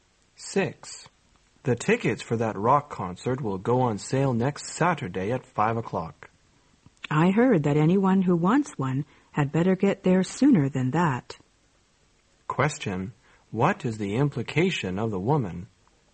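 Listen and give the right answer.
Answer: People should go before 5 o'clock to get tickets.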